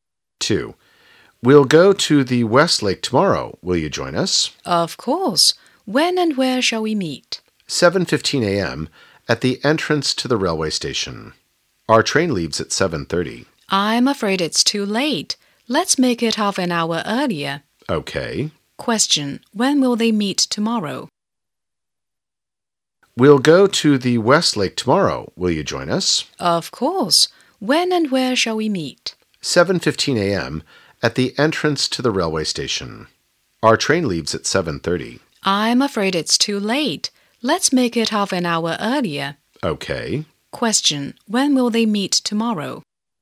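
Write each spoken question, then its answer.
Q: When will they meet tomorrow?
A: At 6:45 a.m.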